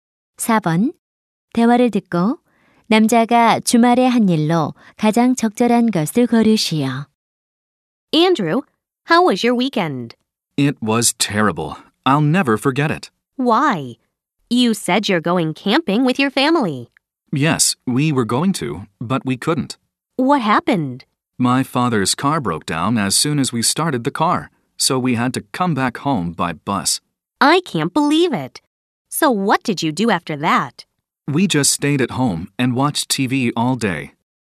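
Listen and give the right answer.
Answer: 집에서 하루 종일 TV를 봤다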